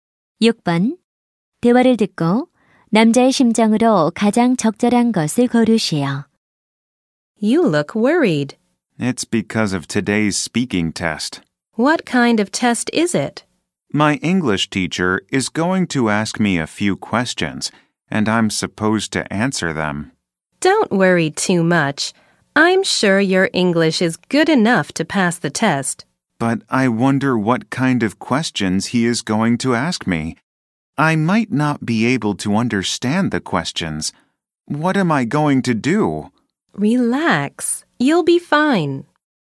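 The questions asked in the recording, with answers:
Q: 대화를 듣고 남자의 심정으로 가장 적절한 것을 고르시오.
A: 걱정스러운(불안한)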